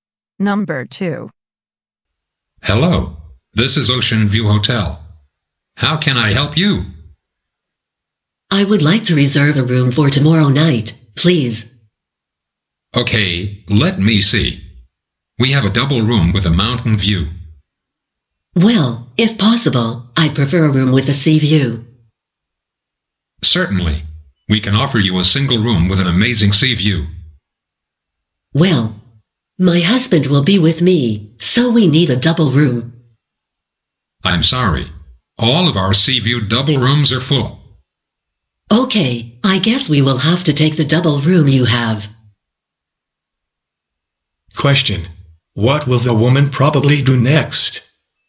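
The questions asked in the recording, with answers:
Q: What will the woman probably do next?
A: Reserve the double room with a mountain view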